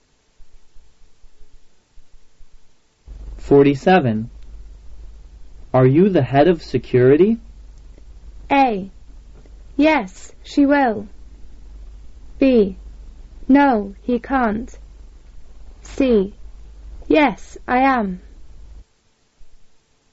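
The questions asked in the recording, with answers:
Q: Are you the head of security?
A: C: Yes, I am.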